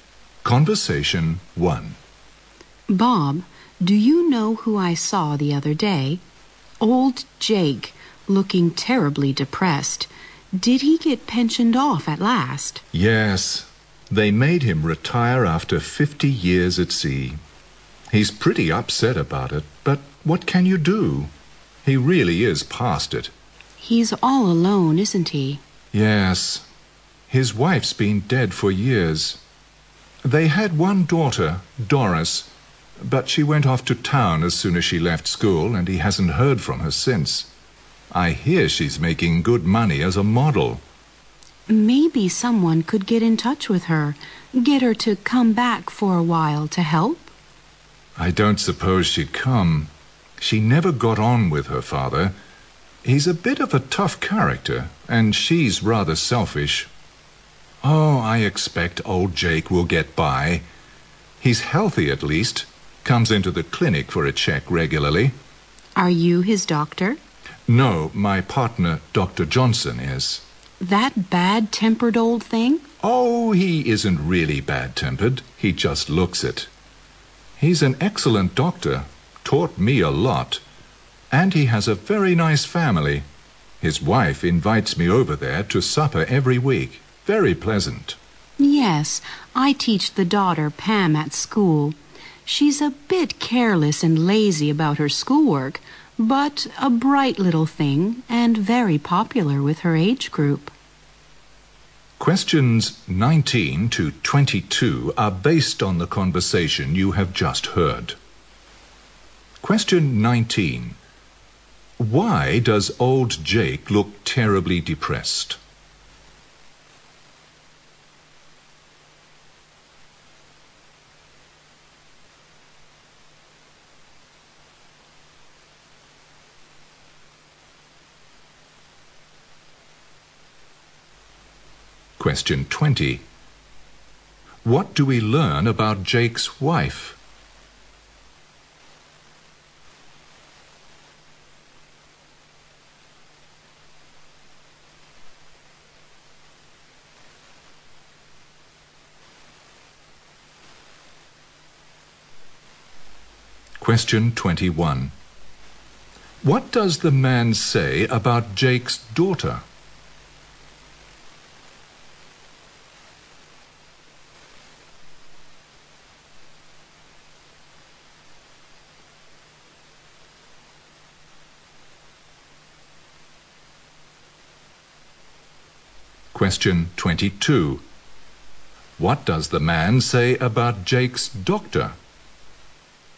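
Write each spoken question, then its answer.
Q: Why does old Jake look terribly depressed?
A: He was made to retire after 50 years at sea.

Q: What do we learn about Jake's wife?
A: She died years ago.

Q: What does the man say about Jake's daughter?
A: She is selfish and never got on with her father.

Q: What does the man say about Jake's doctor?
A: He is an excellent doctor, though he looks bad-tempered.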